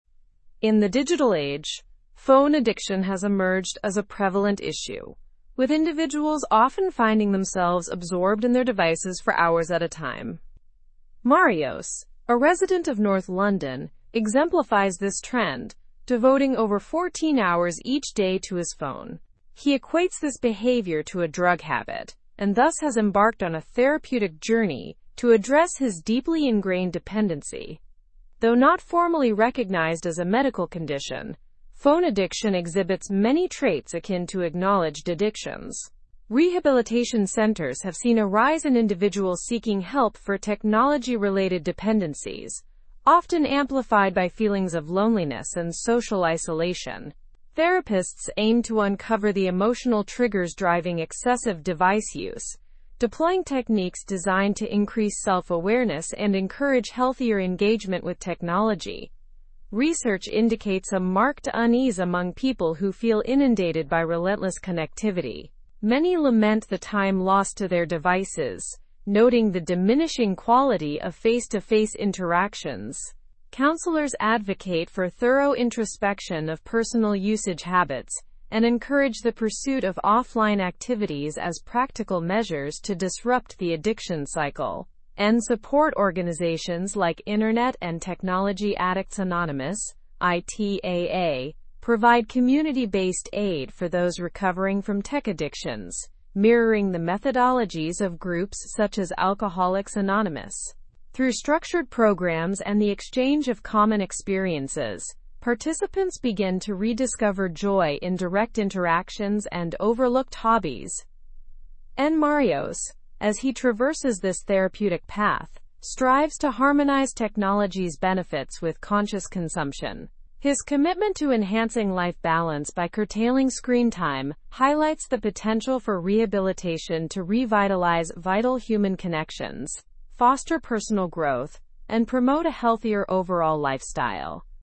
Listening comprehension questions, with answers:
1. What issue has become common in the digital age?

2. How does Marios describe his phone usage?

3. Why do rehabilitation centers report a surge in tech-related patients?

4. What do studies reveal about users feeling overwhelmed?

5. What role do support networks like ITAA play in tech addiction recovery?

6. What does Marios aim to achieve through his therapy?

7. How might rehabilitation impact human connections?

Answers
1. Phone addiction has become a common issue.
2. Marios equates his phone usage to having a drug habit.
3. Rehabilitation centers report a surge due to increased loneliness and social isolation.
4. Studies reveal significant discomfort among users who feel overwhelmed by connectivity.
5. They offer community-based resources and structured programs to aid recovery.
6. Marios aims to reduce screen time and improve life balance.
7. Rehabilitation has the potential to revitalize meaningful human connections.

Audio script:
In the digital age, phone addiction has emerged as a prevalent issue, with individuals often finding themselves absorbed in their devices for hours at a time. Marios, a resident of North London, exemplifies this trend, devoting over 14 hours each day to his phone. He equates this behavior to a drug habit, and thus has embarked on a therapeutic journey to address his deeply ingrained dependency.\n\nThough not formally recognized as a medical condition, phone addiction exhibits many traits akin to acknowledged addictions. Rehabilitation centers have seen a rise in individuals seeking help for technology-related dependencies, often amplified by feelings of loneliness and social isolation. Therapists aim to uncover the emotional triggers driving excessive device use, deploying techniques designed to increase self-awareness and encourage healthier engagement with technology.\n\nResearch indicates a marked unease among people who feel inundated by relentless connectivity. Many lament the time lost to their devices, noting the diminishing quality of face-to-face interactions. Counselors advocate for thorough introspection of personal usage habits and encourage the pursuit of offline activities as practical measures to disrupt the addiction cycle.\n\nSupport organizations like Internet and Technology Addicts Anonymous (ITAA) provide community-based aid for those recovering from tech addictions, mirroring the methodologies of groups such as Alcoholics Anonymous. Through structured programs and the exchange of common experiences, participants begin to rediscover joy in direct interactions and overlooked hobbies.\n\nMarios, as he traverses this therapeutic path, strives to harmonize technology's benefits with conscious consumption. His commitment to enhancing life balance by curtailing screen time highlights the potential for rehabilitation to revitalize vital human connections, foster personal growth, and promote a healthier overall lifestyle.

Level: Level 4